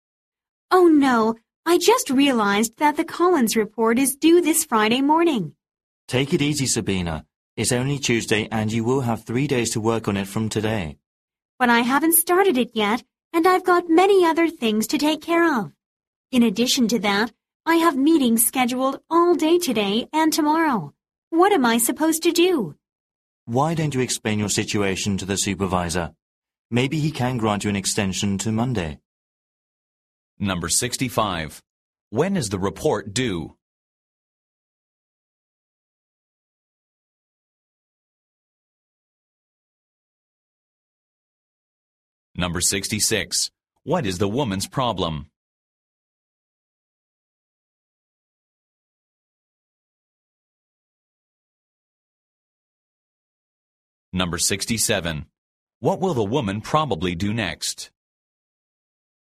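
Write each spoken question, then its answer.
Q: When is the report due?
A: This Friday morning

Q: What is the woman's problem?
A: She hasn't started the report and is too busy with meetings and other tasks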